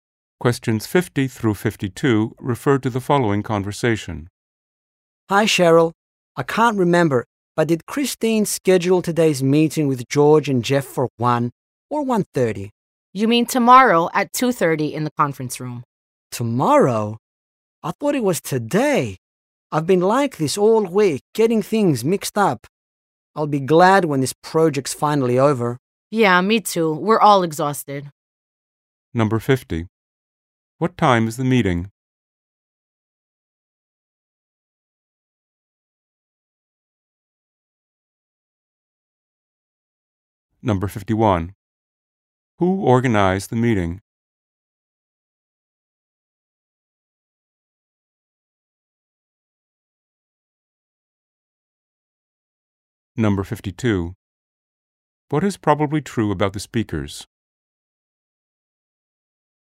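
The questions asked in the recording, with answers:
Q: What time is the meeting?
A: Tomorrow at 2:30

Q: Who organized the meeting?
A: Christine

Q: What is probably true about the speakers?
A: They are tired from working on a project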